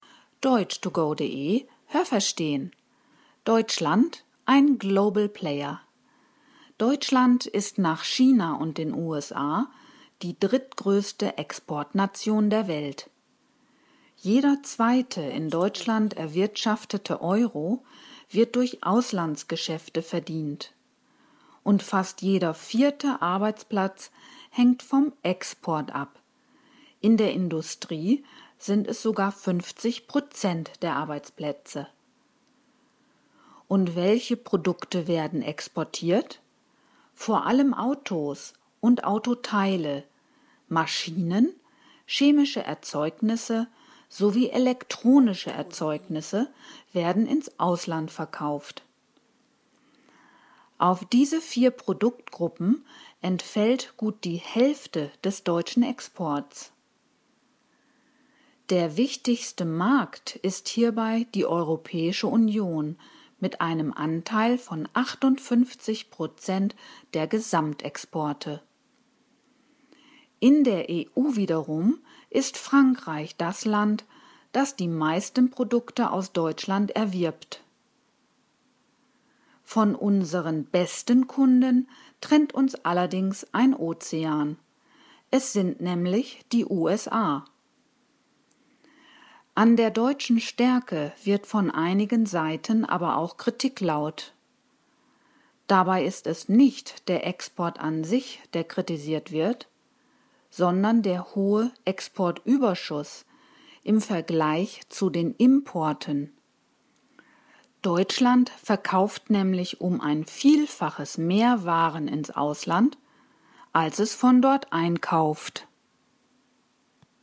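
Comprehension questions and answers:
Welche Präposition passt?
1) Deutschland ist _____ China und den USA die drittgrößte Exportnation der Welt.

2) Jeder zweite Euro wird _____ Auslandgeschäfte verdient.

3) Vor allem Autos und Autoteile werden _____ Ausland verkauft.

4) Gut die Hälfte des Exports entfällt _____ vier Produktgruppen.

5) Deutschland verkauft _____ ein Vielfaches mehr Waren, als es einkauft.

Haben Sie das gehört? Stimmt diese Aussage?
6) Jeder dritte in Deutschland erwirtschaftete Euro wird durch Exporthandel verdient.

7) Die Hälfte aller Arbeitsplätze in der Industrie hängt von Auslandsgeschäften ab.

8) Zu den für den Export relevanten Produktgruppen gehören auch chemische Erzeugnisse.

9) In der EU entfallen 58 % der Exporte aus Deutschland auf Frankreich.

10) Bemängelt wird oft die Tatsache, dass Deutschland mehr exportiert als importiert.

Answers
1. nach
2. durch
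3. ins
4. auf
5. um
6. falsch
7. richtig
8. richtig
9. falsch
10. richtig

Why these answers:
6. Es ist sogar jeder zweite.
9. Die EU als Ganzes hat einen Anteil von 58 % am Gesamtexport.

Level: C (schwer)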